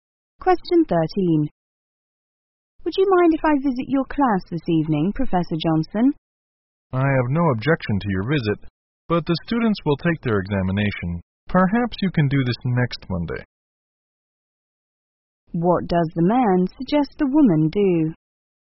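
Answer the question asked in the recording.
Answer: Visit the class next Monday.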